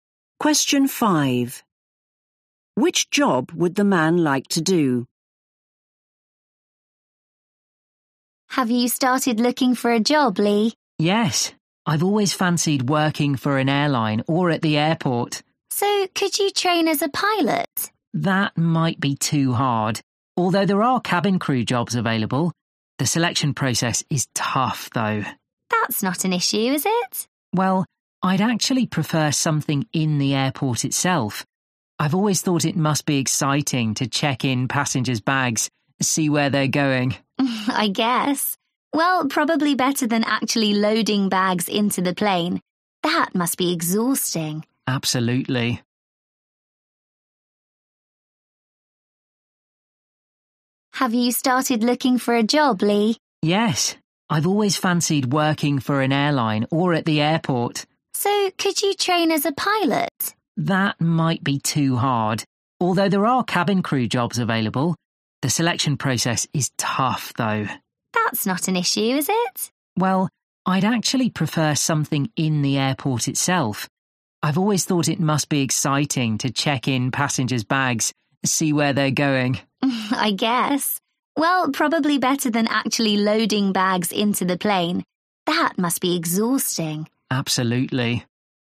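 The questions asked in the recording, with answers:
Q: Which job would the man like to do?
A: checking in passengers' bags at the airport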